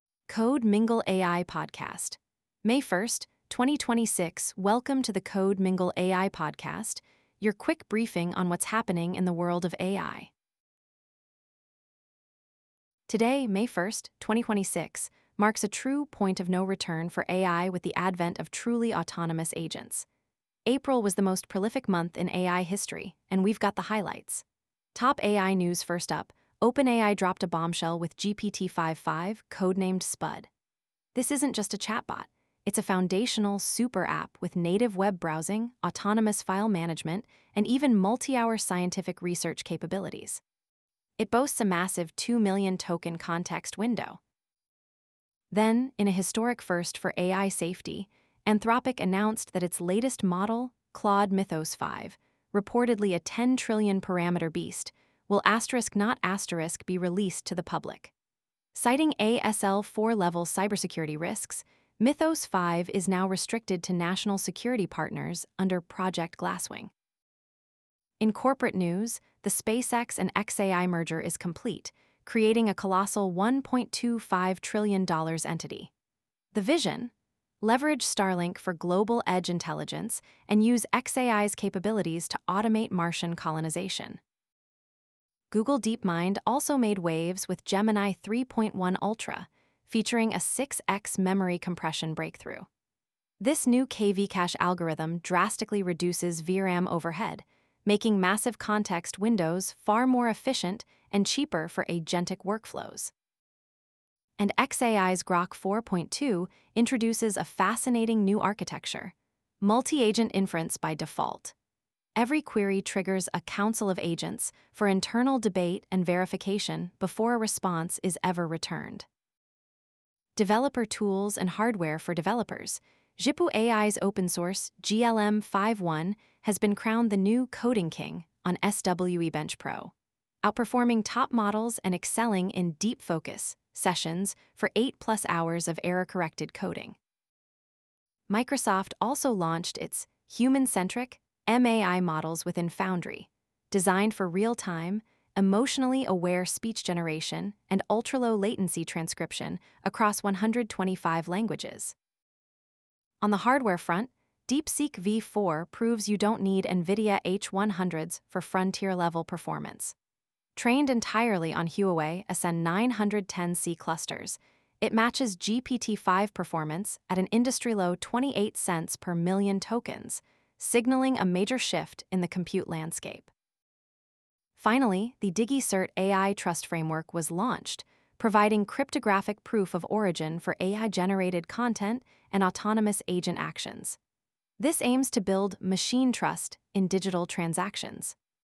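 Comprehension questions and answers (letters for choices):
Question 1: According to the briefing, which figure completes this statement: "Anthropic Containment: Claude Mythos 5 Restricted to "Project Glasswing" In a historic first for AI safety, Anthropic announced that its latest model, Claude Mythos 5 (reportedly ____T parameters), will not be released to the public."?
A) 10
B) 1,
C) 2026,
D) 5.5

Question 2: According to the briefing, which figure completes this statement: "Technical Deep Dives (Architecture & Implementation) Google Gemini ____ Ultra: 6x Memory Compression Breakthrough Google DeepMind has introduced a novel KV-cache compression algorithm in Gemini 3.1 Ultra."?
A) 1,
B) 2026,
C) 5.5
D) 3.1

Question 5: According to the briefing, which figure completes this statement: "Executive Summary As of May ____ 2026, the artificial intelligence industry has reached a "point of no return" with the arrival of the first generation of truly autonomous agents."?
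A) 1,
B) 2026,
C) 5.5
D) 5. K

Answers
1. A
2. D
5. A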